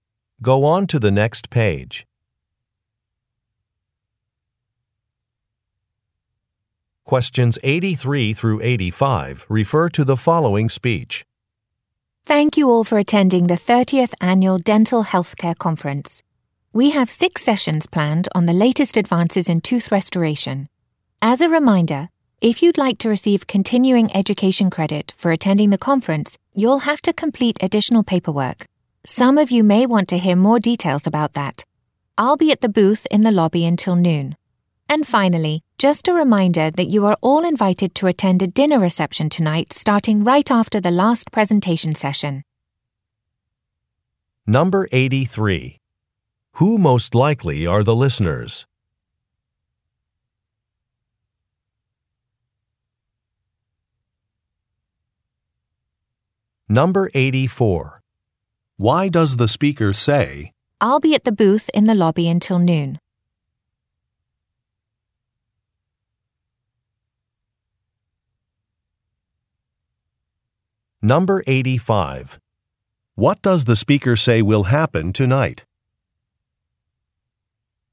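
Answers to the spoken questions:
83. Dental professionals attending a conference
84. To offer to explain the paperwork for continuing education credit
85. A dinner reception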